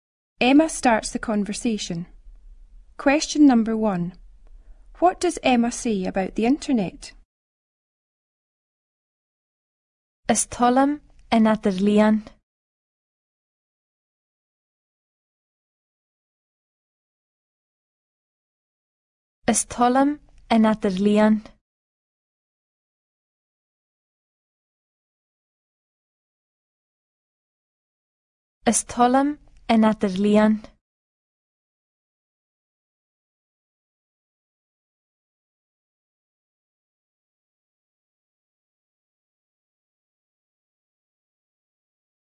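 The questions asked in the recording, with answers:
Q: What does Emma say about the internet?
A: She likes the internet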